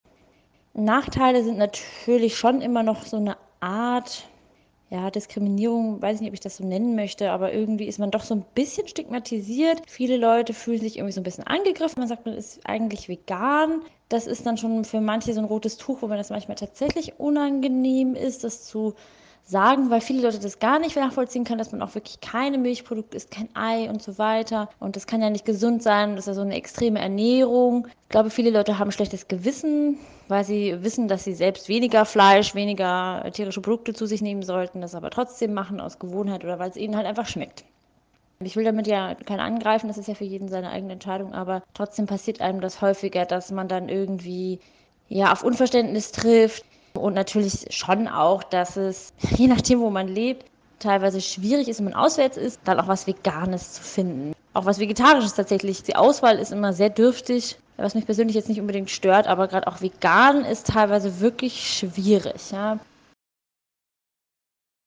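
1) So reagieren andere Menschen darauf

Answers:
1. Viele fühlen sich angegriffen, reagieren mit Unverständnis und halten vegane Ernährung für ungesund und extrem.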